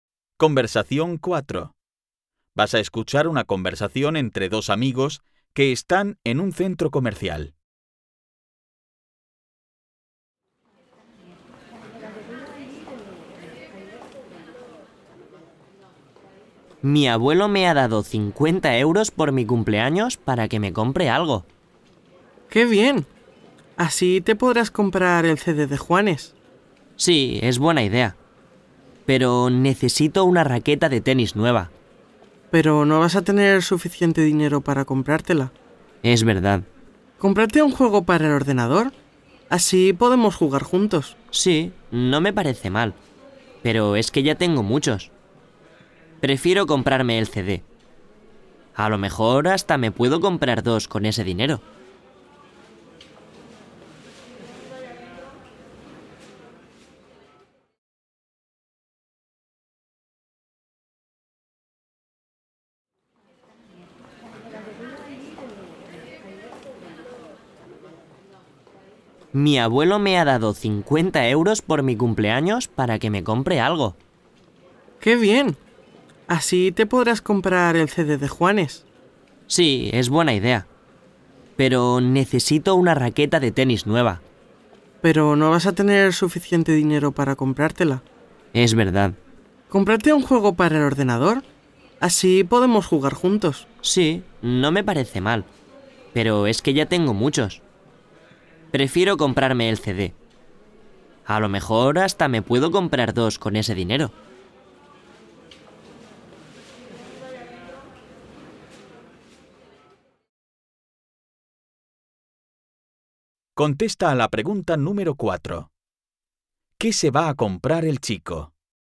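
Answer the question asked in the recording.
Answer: El CD de Juanes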